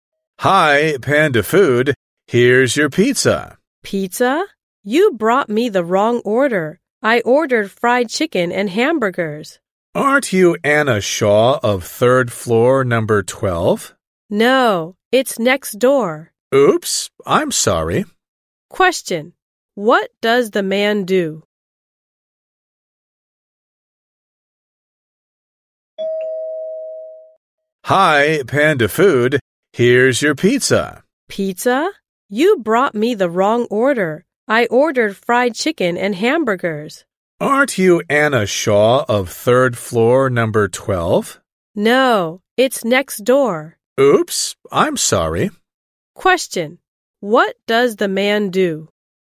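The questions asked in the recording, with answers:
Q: Question: What does the man do?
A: He delivers food (a delivery man for Panda Food).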